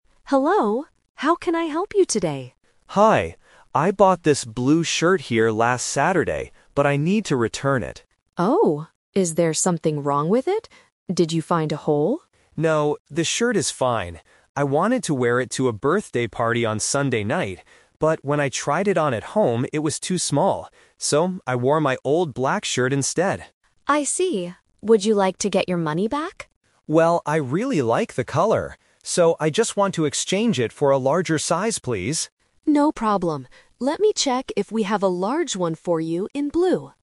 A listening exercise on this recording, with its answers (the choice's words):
Listen to the conversation between a customer and a shop assistant. Then, circle the correct answer for each question.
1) What did the customer wear to the party on Sunday?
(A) A new blue shirt.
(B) An old black shirt.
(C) A white jacket.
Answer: An old black shirt.

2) Why didn't the customer wear the new shirt?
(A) Because it had a hole.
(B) Because it was too small.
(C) Because he didn't like the color.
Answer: Because it was too small.

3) What does the customer want to do now?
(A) Get his money back.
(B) Get a bigger size.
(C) Buy a different color.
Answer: Get a bigger size.

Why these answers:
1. The customer says, "So, I wore my old black shirt instead." Option (A) is the trap (The Twist); he wanted to wear the new blue shirt, but he couldn't. Option (C) is not mentioned in the audio.
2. The customer explains, "But when I tried it on at home, it was too small." Option (A) is a trap; the assistant asks if there is a hole, but the customer says "No, the shirt is fine." Option (C) is incorrect because he says he really likes the color.
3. The customer states clearly, "So, I just want to exchange it for a larger size, please." Option (A) is the trap; the assistant asks if he wants his money back, but he chooses to exchange it. Option (C) is not mentioned (he wants the same color).

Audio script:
Assistant: Hello. How can I help you today?
Customer: Hi. I bought this blue shirt here last Saturday, but I need to return it.
Assistant: Oh, is there something wrong with it? Did you find a hole?
Customer: No, the shirt is fine. I wanted to wear it to a birthday party on Sunday night. But when I tried it on at home, it was too small. So, I wore my old black shirt instead.
Assistant: I see. Would you like to get your money back?
Customer: Well, I really like the color. So, I just want to exchange it for a larger size, please.